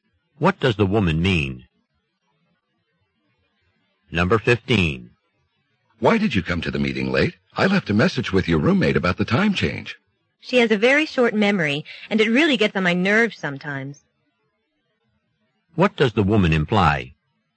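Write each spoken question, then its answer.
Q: What does the woman imply?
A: Her roommate forgot to give her the message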